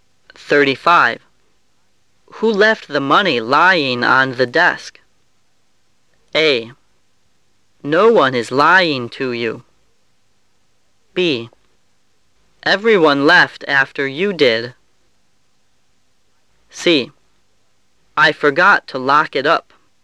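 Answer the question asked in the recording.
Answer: C: I forgot to lock it up.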